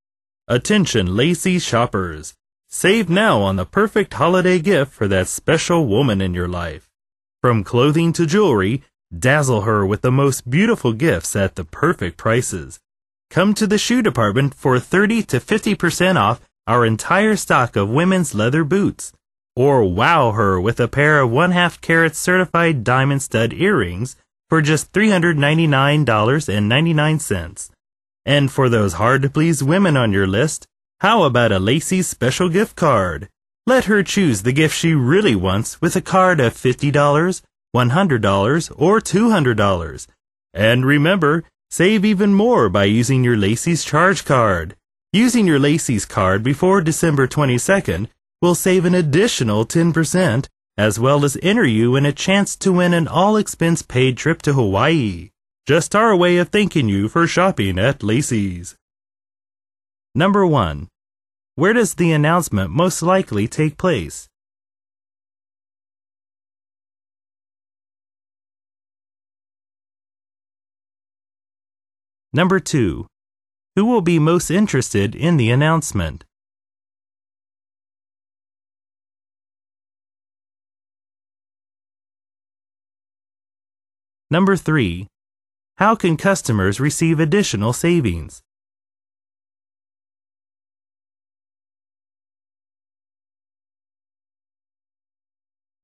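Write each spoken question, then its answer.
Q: Where does the announcement most likely take place?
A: In a department store (Lacey's)

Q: Who will be most interested in the announcement?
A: Shoppers looking for holiday gifts for women

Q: How can customers receive additional savings?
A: By using their Lacey's charge card before December 22nd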